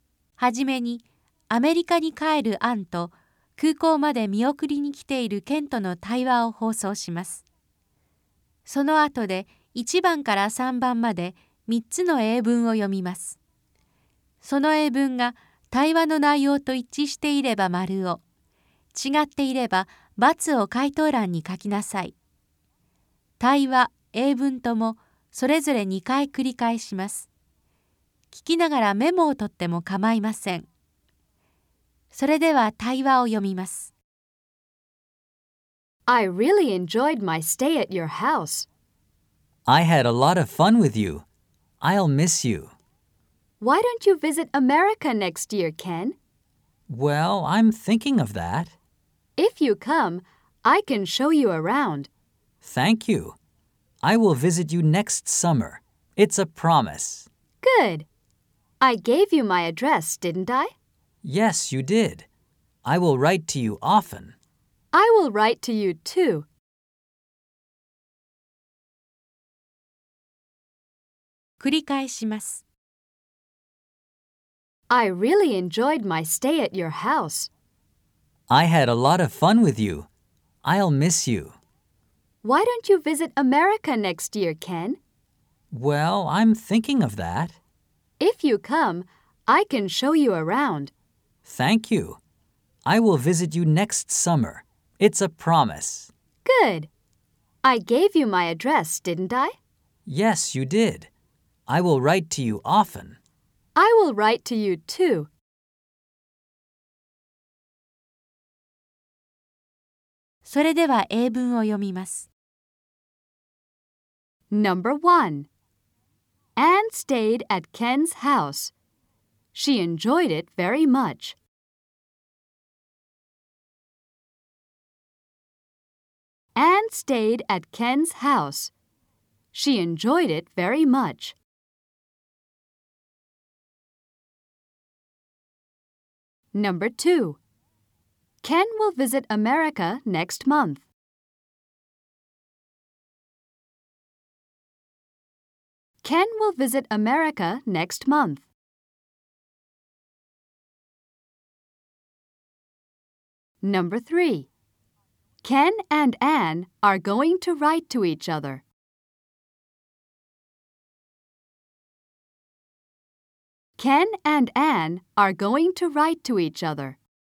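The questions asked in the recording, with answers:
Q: Anne stayed at Ken's house. She enjoyed it very much.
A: ○ (true)

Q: Ken will visit America next month.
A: × (false)

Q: Ken and Anne are going to write to each other.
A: ○ (true)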